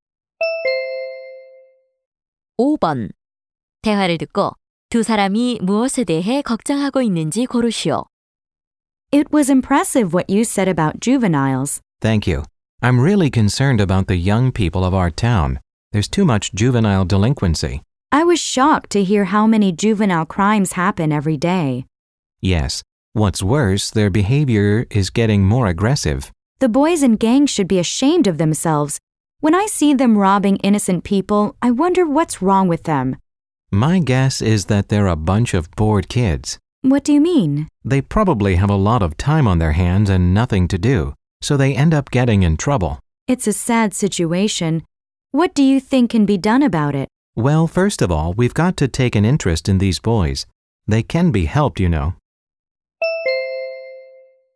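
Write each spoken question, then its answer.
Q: 대화를 듣고 두 사람이 무엇에 대해 걱정하고 있는지 고르시오.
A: 청소년 범죄(비행)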